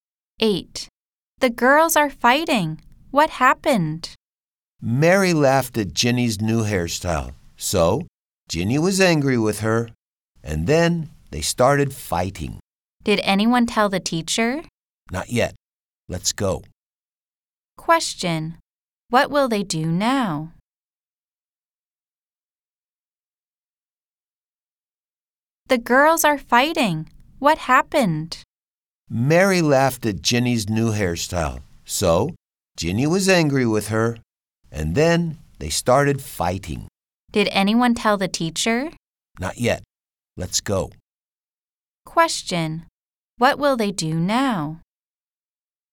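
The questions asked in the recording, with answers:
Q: Question. What will they do now?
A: Go and tell the teacher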